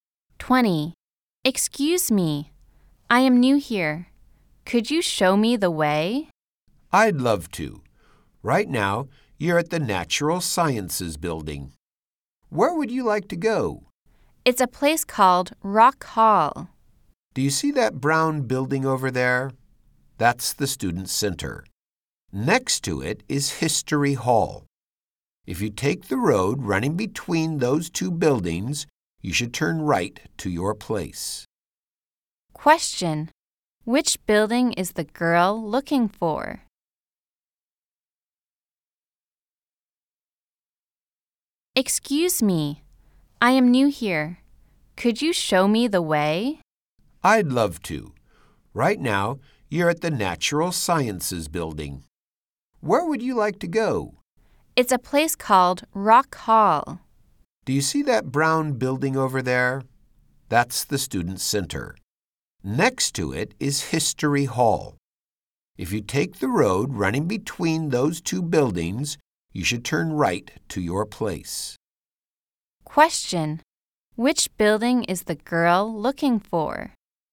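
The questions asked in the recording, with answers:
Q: Which building is the girl looking for?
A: Rock Hall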